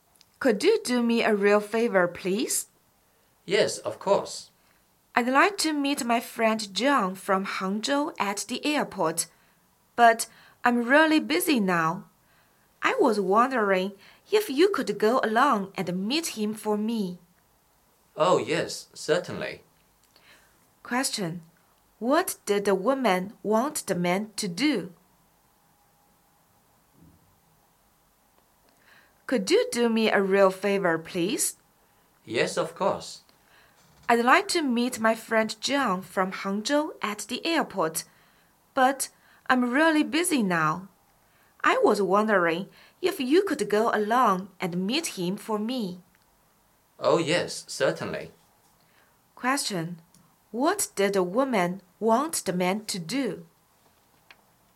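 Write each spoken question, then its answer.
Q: Question: What did the woman want the man to do?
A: Meet her friend John at the airport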